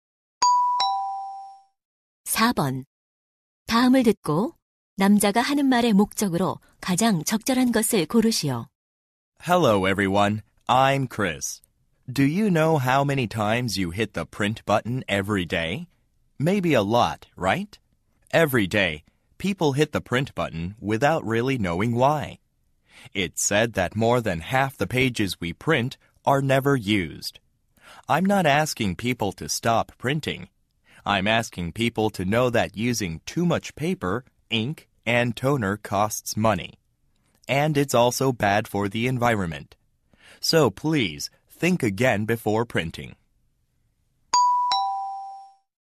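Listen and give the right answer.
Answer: 인쇄하기 전에 다시 생각해 종이 낭비를 줄이자고 당부하려고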